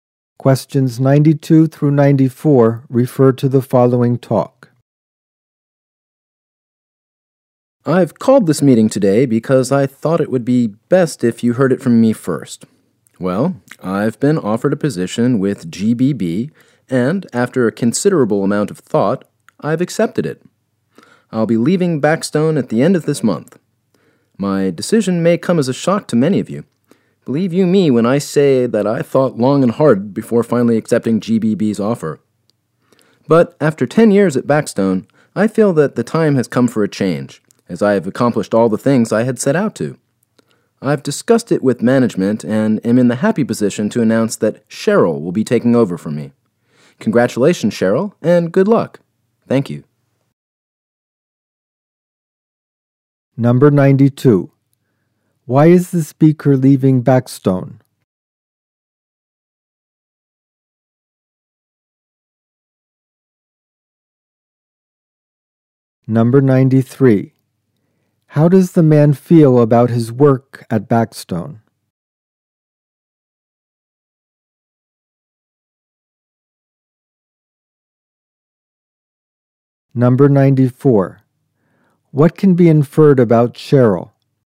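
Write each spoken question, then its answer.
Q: Why is the speaker leaving Backstone?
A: He accepted a job at GBB because he felt it was time for a change

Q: How does the man feel about his work at Backstone?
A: He feels he has accomplished everything he set out to do

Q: What can be inferred about Cheryl?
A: She will take over the speaker's position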